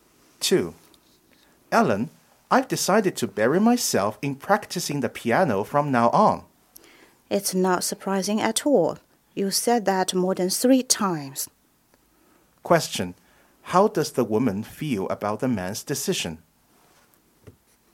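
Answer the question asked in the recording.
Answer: She doubts he will stick to it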